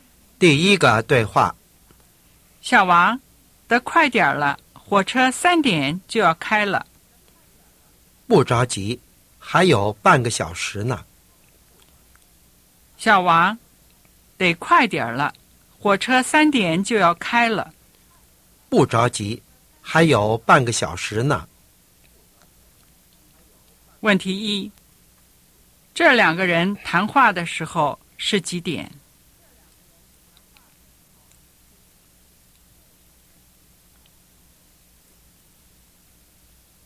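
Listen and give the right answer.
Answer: 两点半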